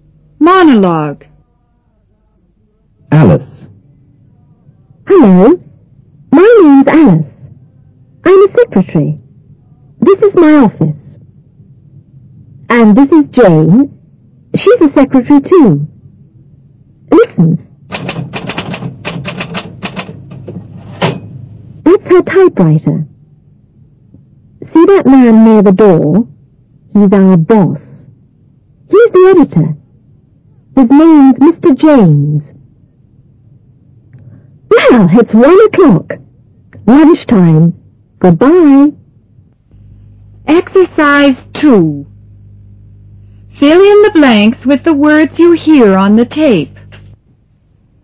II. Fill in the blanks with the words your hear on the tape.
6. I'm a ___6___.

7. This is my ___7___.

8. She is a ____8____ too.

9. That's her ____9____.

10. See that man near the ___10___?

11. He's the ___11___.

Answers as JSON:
{"6": "secretary", "7": "office", "8": "secretary", "9": "typewriter", "10": "door", "11": "editor"}